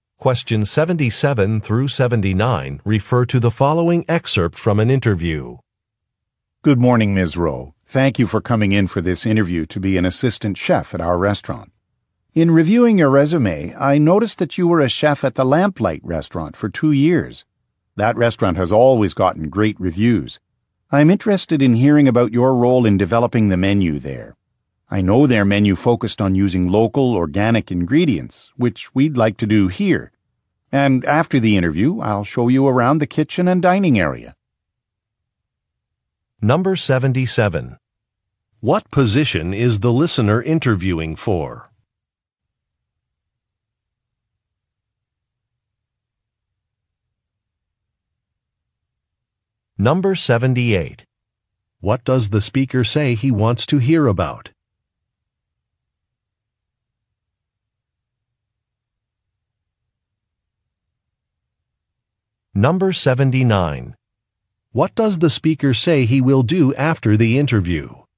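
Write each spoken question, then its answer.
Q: What position is the listener interviewing for?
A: Assistant chef

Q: What does the speaker say he wants to hear about?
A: Her role in developing the menu at the Lamplight restaurant

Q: What does the speaker say he will do after the interview?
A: Show her around the kitchen and dining area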